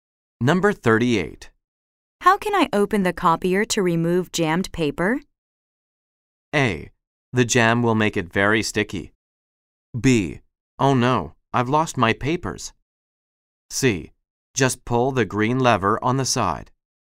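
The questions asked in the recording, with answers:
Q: How can I open the copier to remove jammed paper?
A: C: Just pull the green lever on the side.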